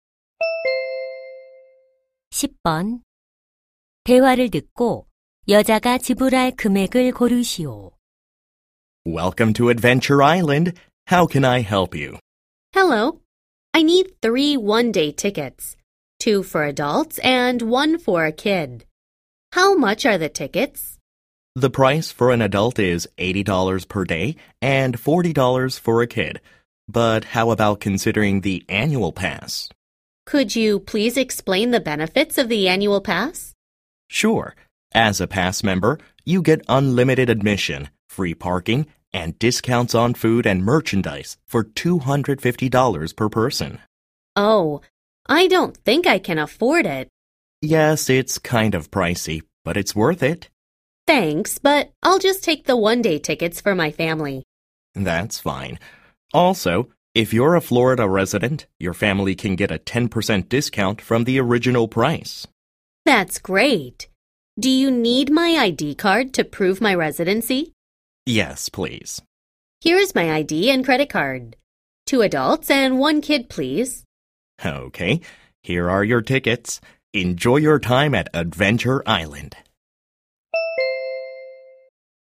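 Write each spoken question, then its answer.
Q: 대화를 듣고 여자가 지불할 금액을 고르시오.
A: $180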